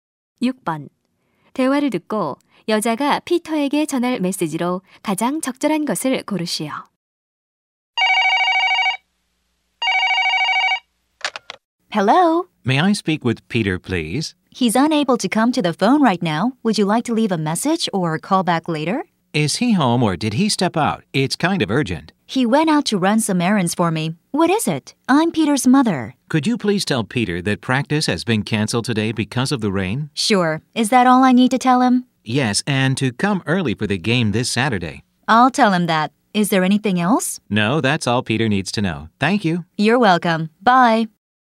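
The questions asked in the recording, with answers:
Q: 대화를 듣고 여자가 피터에게 전할 메시지로 가장 적절한 것을 고르시오.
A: 비 때문에 오늘 연습이 취소되었고, 토요일 경기에 일찍 오라는 것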